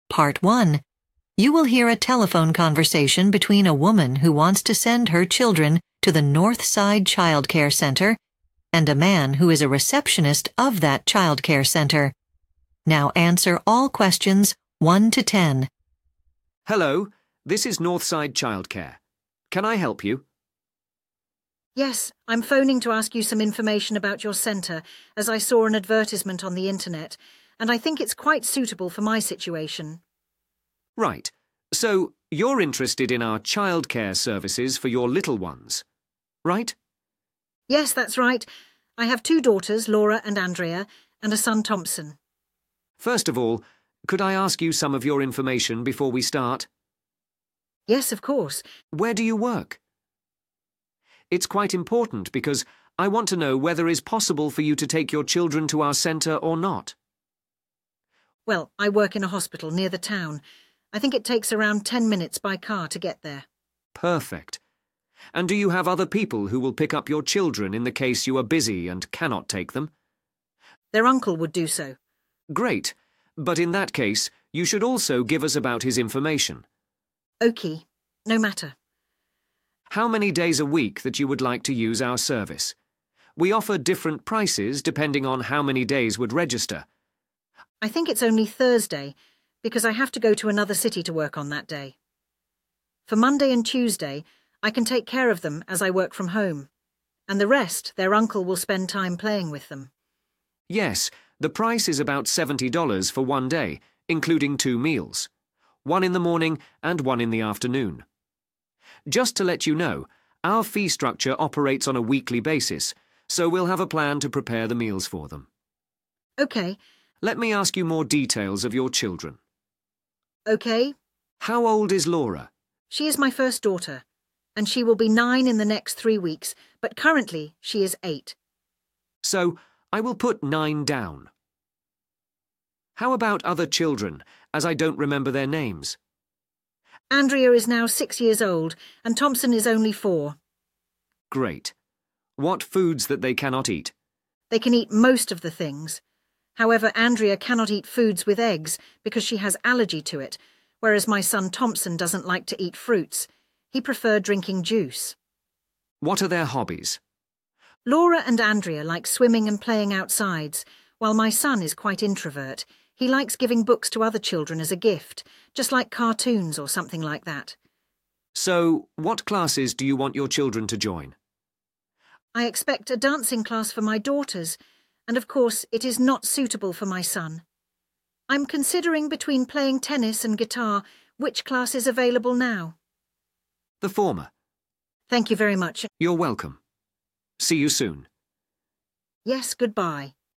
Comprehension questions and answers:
Complete the notes below. Write ONE WORD ONLY for each answer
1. Place of work: 1. __________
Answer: hospital

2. Other people who pick up the children: 2. __________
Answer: uncle

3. Date of using the service: 3. __________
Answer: Thursday

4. Fee will be paid: every 4.__________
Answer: week

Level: PART 1